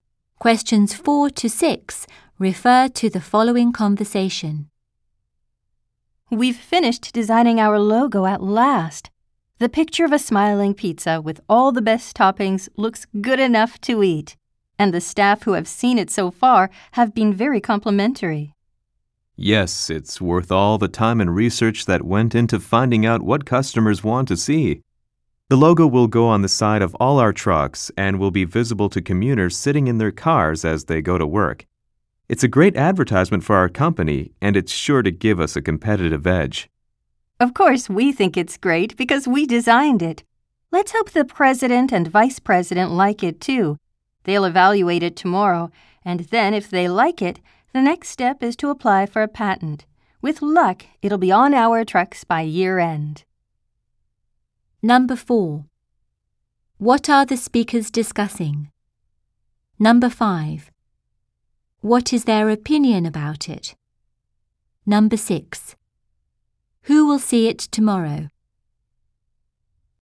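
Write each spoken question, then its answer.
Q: What are the speakers discussing?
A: A company logo they designed

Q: What is their opinion about it?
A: They think it is great

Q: Who will see it tomorrow?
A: The president and vice president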